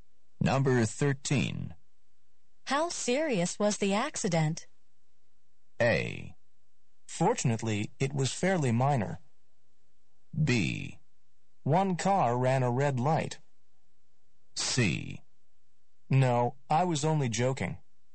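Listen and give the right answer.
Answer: A: Fortunately, it was fairly minor.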